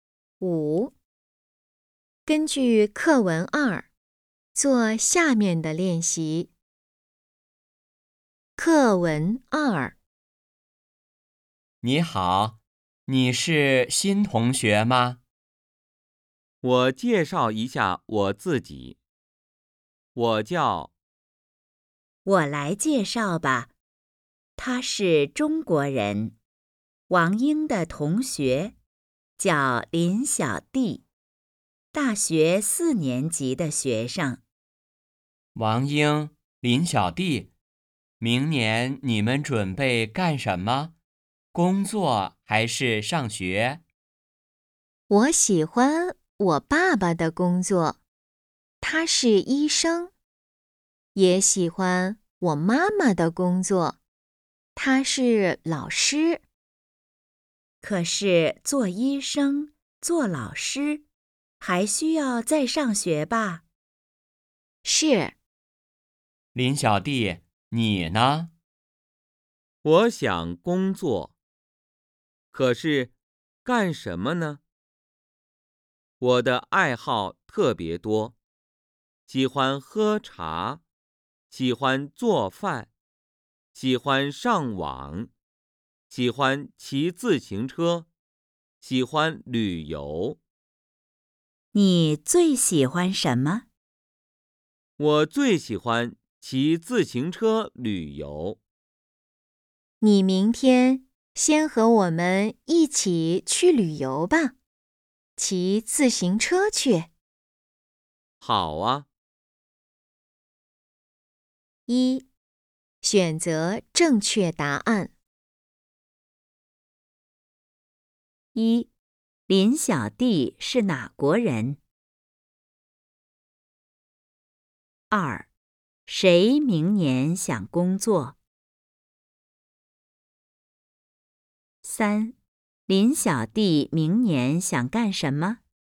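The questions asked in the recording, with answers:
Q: 林小弟是哪国人?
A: 中国人

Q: 谁明年想工作?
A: 林小弟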